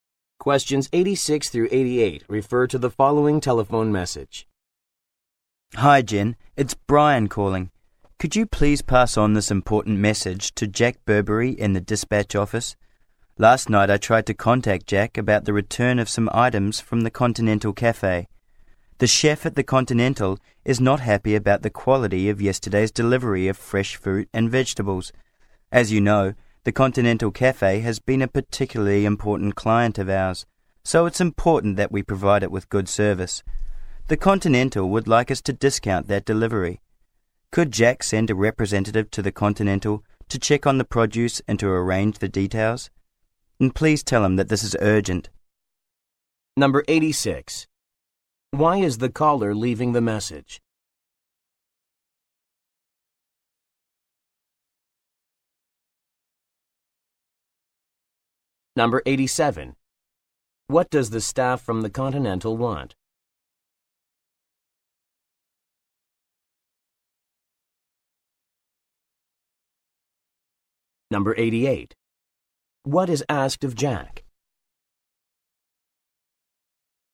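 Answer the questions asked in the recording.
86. A client complained about the quality of a delivery
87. A discount on the delivery
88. To send a representative to the Continental to check the produce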